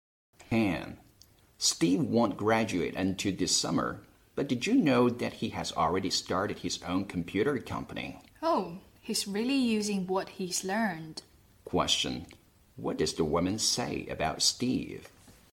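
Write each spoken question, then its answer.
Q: What does the woman say about Steve?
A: He is putting what he has learned to use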